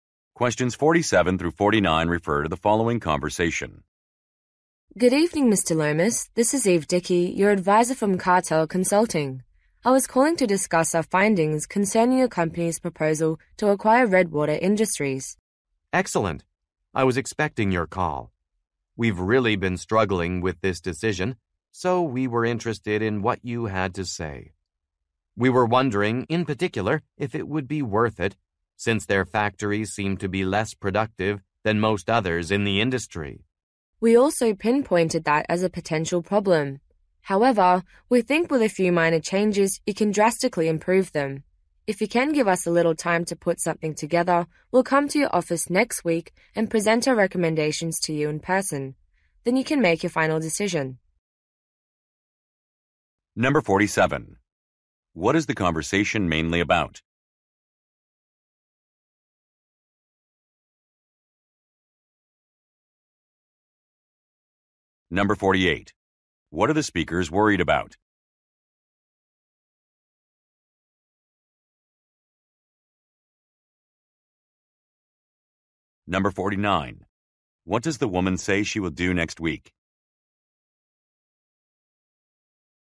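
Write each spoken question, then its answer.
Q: What is the conversation mainly about?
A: A proposal to acquire another company

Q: What are the speakers worried about?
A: The other company's factories are less productive

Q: What does the woman say she will do next week?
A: Present recommendations in person at his office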